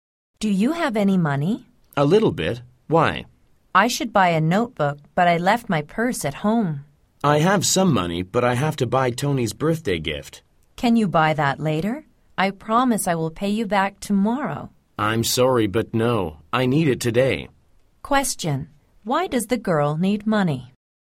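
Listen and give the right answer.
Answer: To buy a notebook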